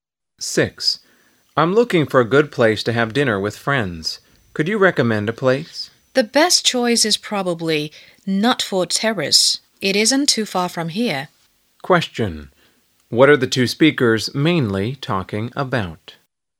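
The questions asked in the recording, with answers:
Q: What are the two speakers mainly talking about?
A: A place (restaurant) to have dinner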